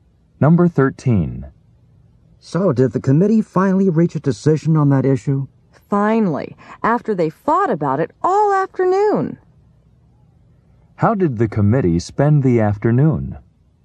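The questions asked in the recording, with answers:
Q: How did the committee spend the afternoon?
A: Fighting about the issue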